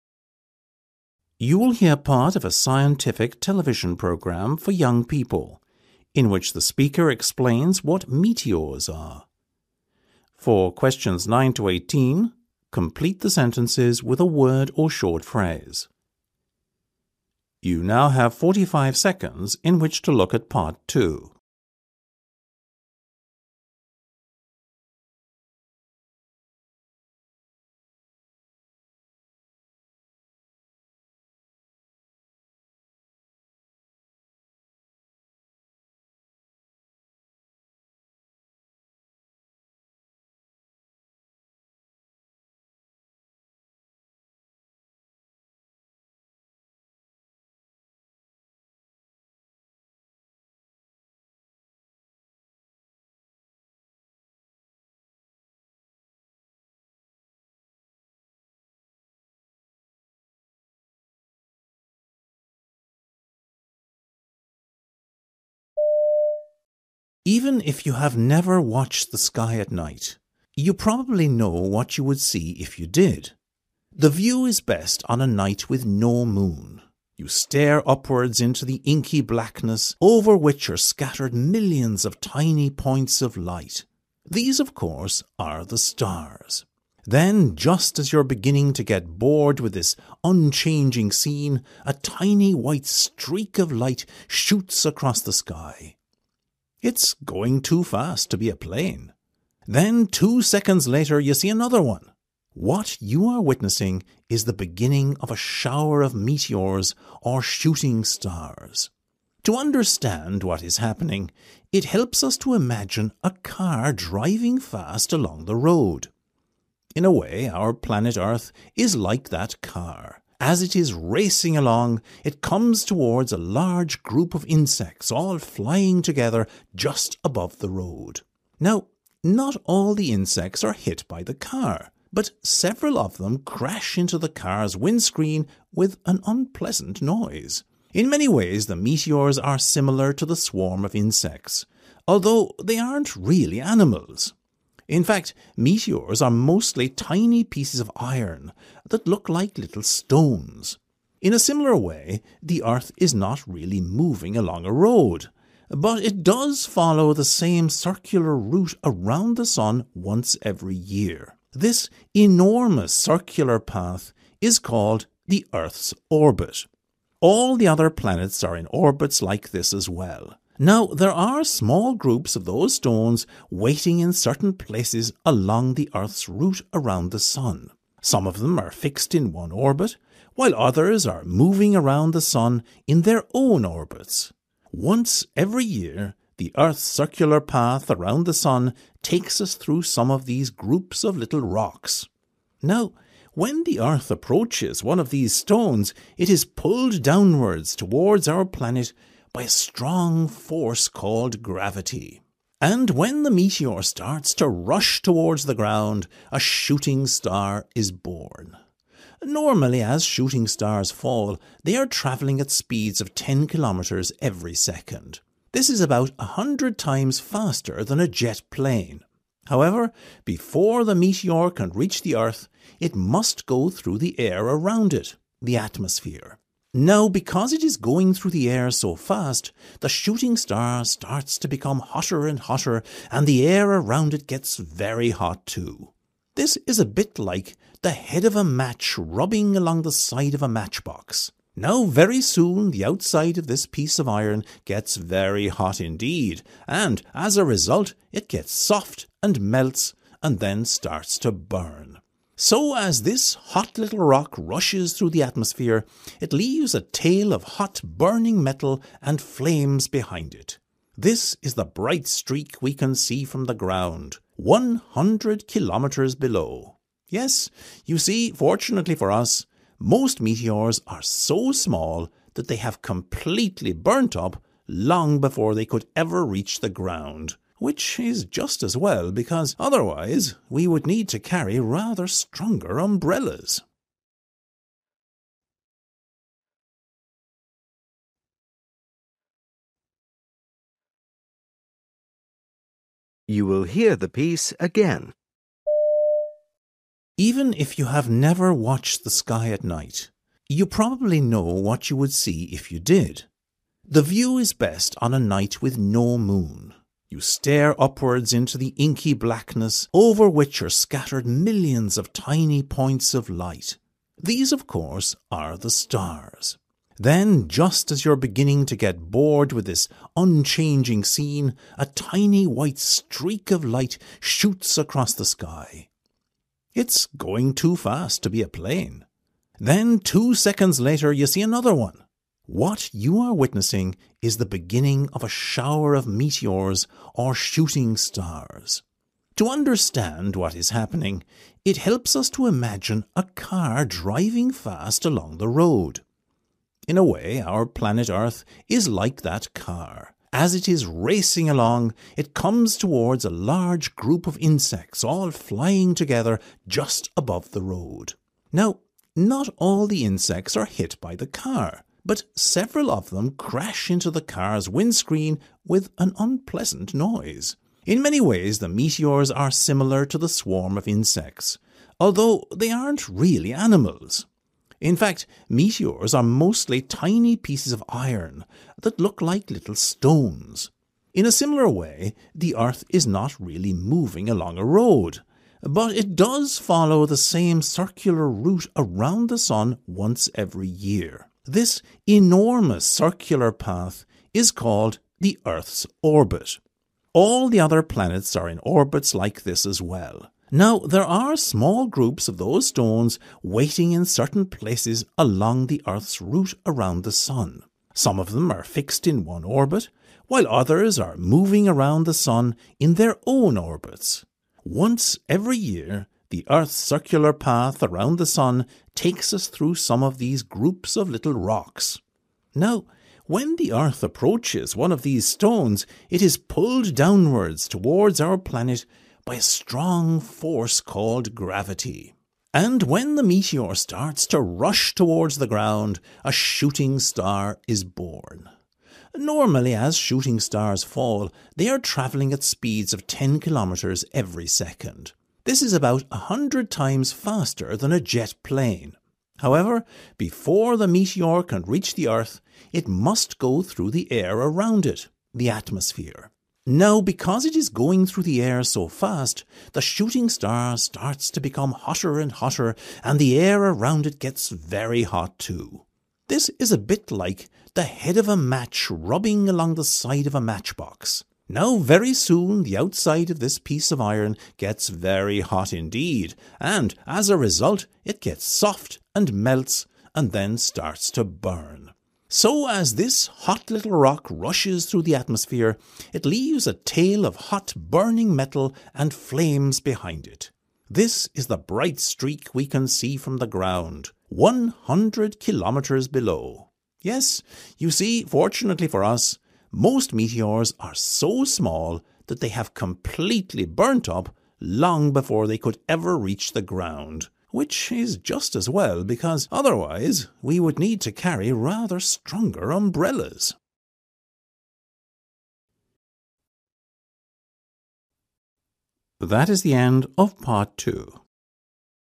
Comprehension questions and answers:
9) 'Meteors' is another name for (9) .............................. .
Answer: shooting stars

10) To help explain meteors, planet Earth is compared to a (10) .............................. .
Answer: car

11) You can think of meteors as a group of (11) .............................. .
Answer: insects

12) In reality, meteors are very small chunks of (12) .............................. .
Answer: iron

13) The circular path the Earth travels around the Sun is called its (13) .............................. .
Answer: orbit

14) When Earth comes close to a meteor, the meteor is pulled (14) .............................. by gravity.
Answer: downwards

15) A meteor travels very fast – a hundred times faster than (15) .............................. .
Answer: a jet plane

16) Due to the speed it travels through the air, the meteor becomes (16) .............................. .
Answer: hotter and hotter

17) Because of the heat, the meteor becomes less hard, (17) .............................. and then burns.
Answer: melts

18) We are lucky that most meteors burn up and never (18) .............................. .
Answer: reach the ground

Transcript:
Presenter: Even if you have never watched the sky at night, you probably know what you would see if you did. The view is best on a night with no moon. You stare upwards into the inky blackness over which are scattered millions of tiny points of light. These, of course, are the stars. Then just as you're beginning to get bored with this unchanging scene, a tiny white streak of light shoots across the sky. It's going too fast to be a plane. Then two seconds later you see another one. What you are witnessing is the beginning of a shower of meteors or shooting stars.
To understand what is happening, it helps us to imagine a car driving fast along the road. In a way, our planet Earth is like that car. As it is racing along, it comes towards a large group of insects all flying together just above the road.
Now, not all the insects are hit by the car, but several of them crash into the car's windscreen with an unpleasant noise. In many ways, the meteors are similar to the swarm of insects, although they aren't re ally animals. In fact, meteors are mostly tiny pieces of iron that look like little stones.
In a similar way, the Earth is not really moving along a road. But it does follow the same circular route around the sun once every year. This enormous circular path is called the Earth's 'orbit'. All the other planets are in orbits like this as well. Now, there are small groups of those stones waiting in certain places along the Earth's route around the sun. Some of them are fixed in one orbit while others are moving around the sun in their own orbits. Once every year, the Earth's circular path around the sun takes us through some of these groups of little rocks.
Now, when the earth approaches one of these stones, it is pulled downwards towards our planet by a strong force called gravity. And when the meteor starts to rush towards the ground, a shooting star is born. Normally, as shooting stars fall, they are travelling at speeds of 10 kilometres every second. This is about a hundred times faster than a jet plane. However, before the meteor can reach the Earth, it must go through the air around it – the atmosphere. Now, because it is going through the air so fast, the shooting star starts to become hotter and hotter and the air around it gets very hot too. This is a bit like the head of a match rubbing along the side of a matchbox. Now, very soon the outside of this piece of iron gets very hot indeed and, as a result, it gets soft and melts and then starts to burn. So, as this hot little rock rushes through the atmosphere, it leaves a tail of hot burning metal and flames behind it. This is the bright streak we can see from the ground – 100 kilometres below. Yes, you see, fortunately for us, most meteors are so small that they have completely burned up long before they could ever reach the ground – which is just as well because, otherwise, we would need to carry rather stronger umbrellas!